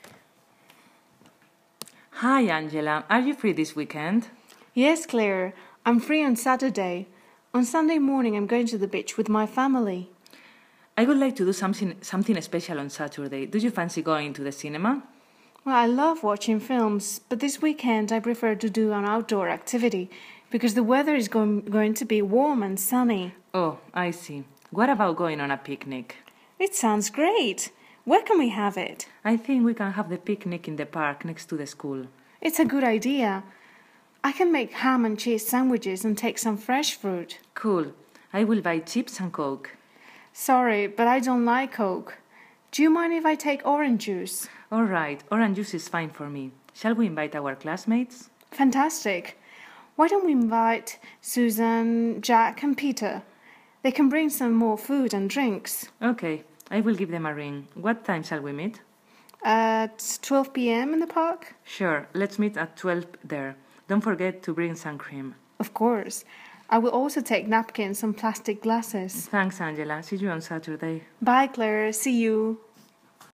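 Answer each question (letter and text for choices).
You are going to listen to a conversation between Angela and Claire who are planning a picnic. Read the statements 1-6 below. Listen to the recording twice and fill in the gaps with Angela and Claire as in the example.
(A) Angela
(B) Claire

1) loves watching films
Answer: (A) Angela

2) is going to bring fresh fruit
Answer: (A) Angela

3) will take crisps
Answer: (B) Claire

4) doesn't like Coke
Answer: (A) Angela

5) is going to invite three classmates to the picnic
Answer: (B) Claire

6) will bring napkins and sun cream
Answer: (A) Angela

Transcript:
C: Hi Angela! Are you free this weekend?
A: Yes, Claire. I'm free on Saturday. On Sunday morning I'm going to the beach with my family.
C: I would like to do something special on Saturday. Do you fancy going to the cinema?
A. I love watching films but I this weekend I prefer to do an outdoor activity because the weather is going to be warm and sunny.
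C: Oh, I see. What about going on a picnic?
A: It sounds great! Where can we have it?
C: I think we can have the picnic in the park next to the school.
A: It's a good idea! I can make ham and cheese sandwiches and take some fresh fruit.
C: Cool! I will buy crisps and coke.
A: Sorry but I don't like coke. Do you mind if I take orange juice?
C: All right, orange juice is fine for me! Shall we invite our classmates?
A: Fantastic! Why don't we invite Susan, Jack and Peter? They can bring more food and drinks.
C: Ok, I will give them a ring. What time shall we meet?
A: At 12pm in the park?
C: Sure, let's meet at 12 there. Don't forget to bring sun cream.
A: Of course, I will also take napkins and plastic glasses.
C: Thanks, Angela. See you on Saturday!
A: Bye, Claire! See you!!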